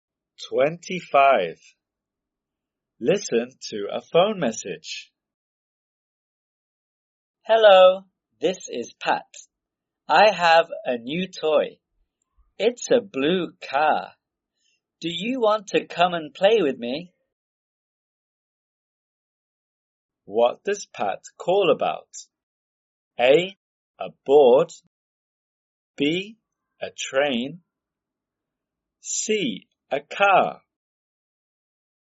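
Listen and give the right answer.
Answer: C: A car.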